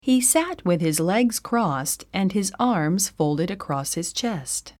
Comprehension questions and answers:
英文の音声を1度だけ聞いて空所の語句を記入しなさい。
He sat ______ and ______ across his chest.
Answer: with his legs crossed, his arms folded